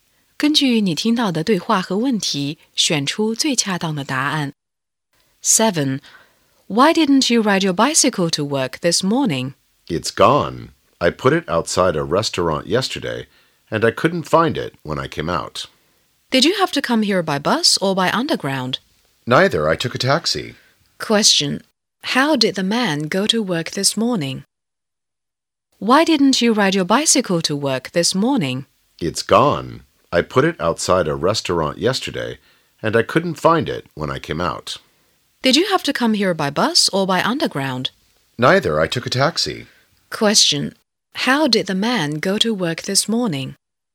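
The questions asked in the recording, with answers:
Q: How did the man go to work this morning?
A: By taxi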